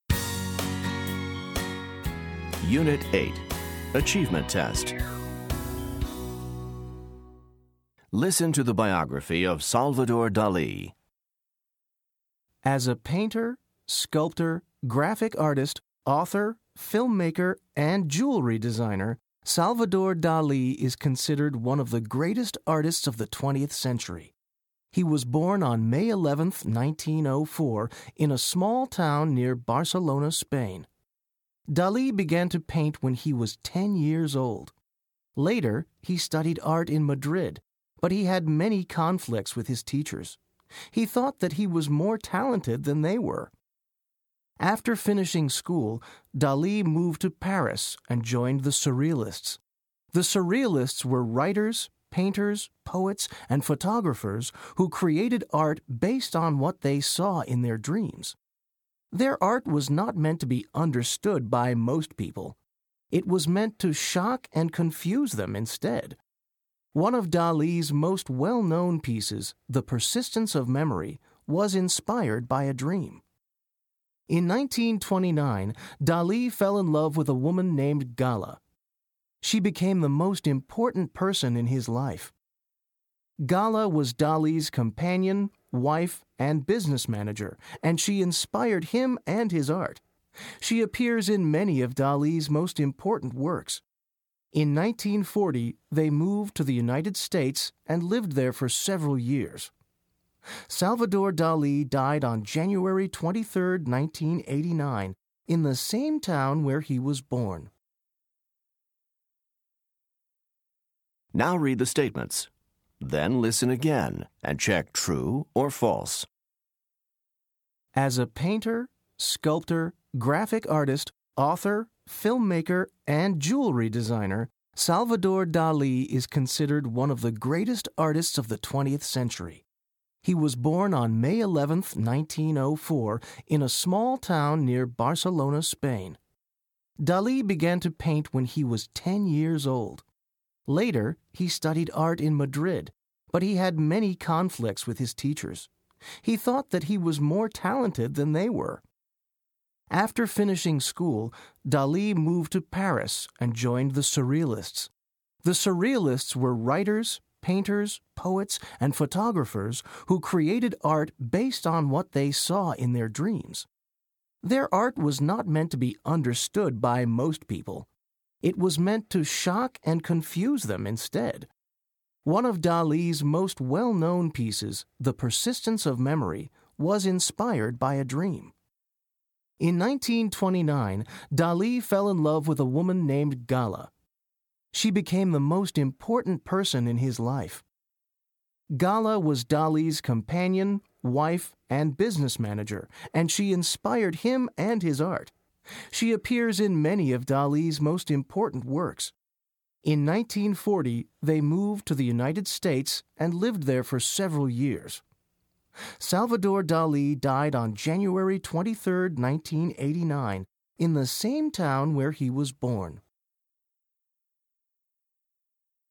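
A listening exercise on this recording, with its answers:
Listen to the biography of Salvador Dali. Then choose True or False for each statement.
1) Dali thought he could learn a lot from his teachers.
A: False

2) Dali joined the Surrealists in Madrid.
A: False

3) The Surrealists wanted people to understand their art.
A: False

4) Dali was influenced by his dreams.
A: True

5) Dali was inspired by Gala.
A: True

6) Gala is pictured in Dali's art.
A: True

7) Dali died in the United States.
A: False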